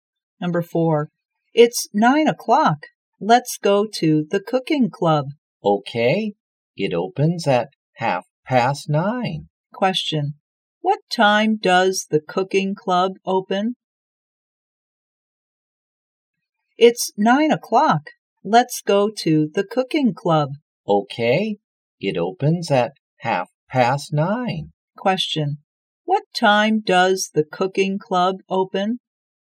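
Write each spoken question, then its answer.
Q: what time does the cooking club open?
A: At 9:30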